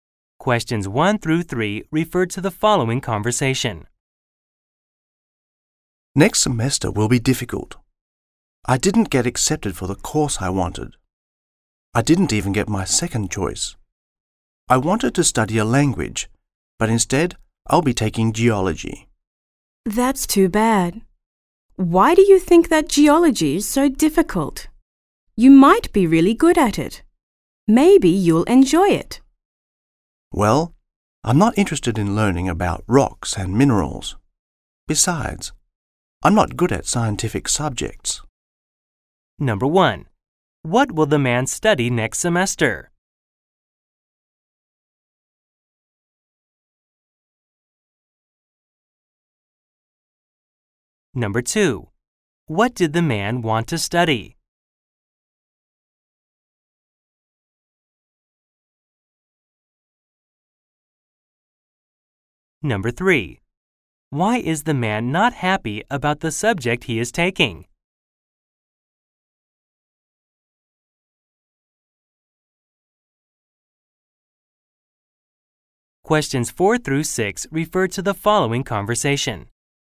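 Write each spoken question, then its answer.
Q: What will the man study next semester?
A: Geology

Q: What did the man want to study?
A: A language

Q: Why is the man not happy about the subject he is taking?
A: He is not interested in rocks and minerals and not good at scientific subjects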